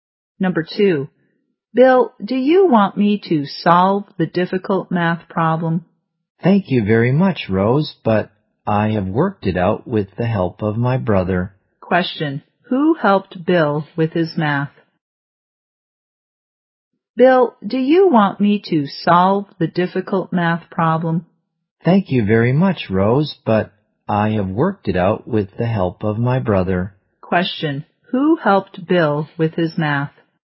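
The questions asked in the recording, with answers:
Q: Question, who helped Bill with his math?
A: His brother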